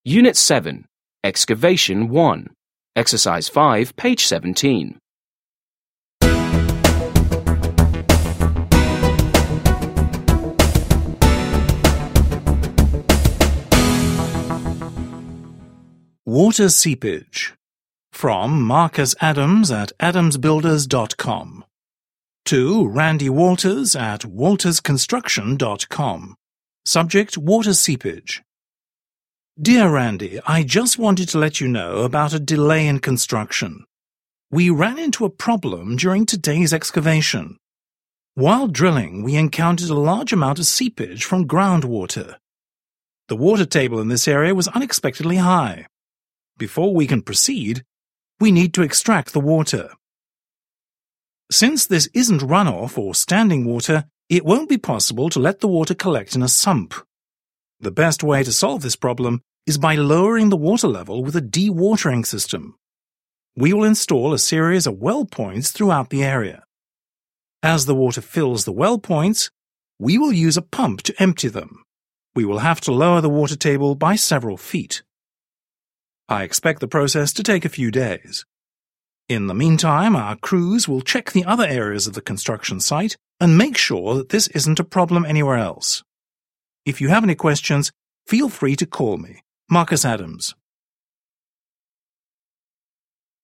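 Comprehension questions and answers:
5. Listen and read the email from a contractor to a project manager again. How does a dewatering system remove water?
How does a dewatering system remove water?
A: Well-points are installed; as water fills them, a pump empties them, lowering the water table.

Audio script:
Subject: Water seepage
Dear Randy,
I just wanted to let you know about a delay in construction.
We ran into a problem during today's excavation. While drilling, we encountered a large amount of seepage from groundwater. The water table in this area was unexpectedly high. Before we can proceed, we need to extract the water.
Since this isn't runoff of standing water, it won't be possible to let the water collect in a sump. The best way to solve this problem is by lowering the water level with a dewatering system. We will install a series of well-points throughout the area. As the water fills the well-points, we will use a pump to empty them. 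We will have to lower the water table by several feet.
I expect the process to take a few days. In the meantime, our crews will check the other areas of the construction site and mаke sure that this isn't a problem anywhere else.
If you have any questions, fell free to call me.
Marcus Adams.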